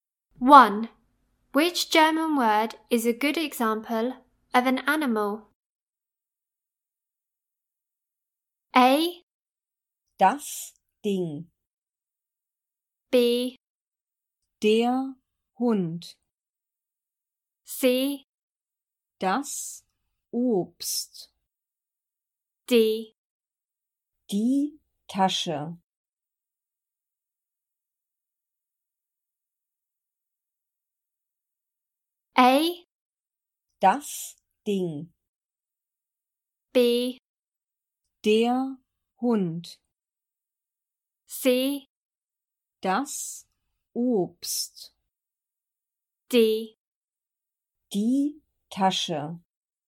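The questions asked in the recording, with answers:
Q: Which German word is a good example of an animal?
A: B: Der Hund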